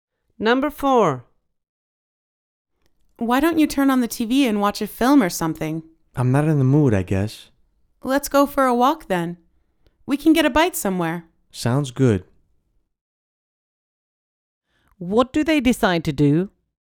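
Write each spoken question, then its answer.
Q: What do they decide to do?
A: Go for a walk and get a bite to eat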